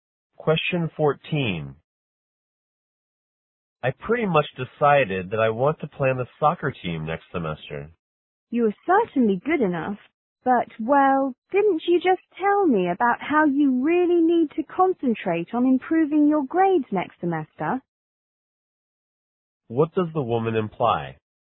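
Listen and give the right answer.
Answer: Playing soccer may keep him from improving his grades.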